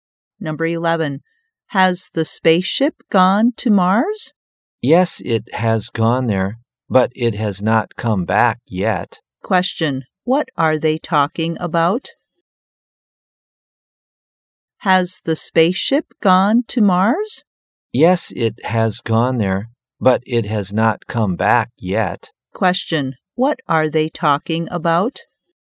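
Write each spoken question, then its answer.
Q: Question, what are they talking about?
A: The spaceship going to Mars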